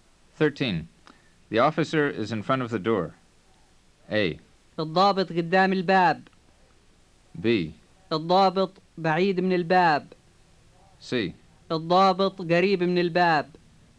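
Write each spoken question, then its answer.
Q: The officer is in front of the door.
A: A: الضابط قدام الباب.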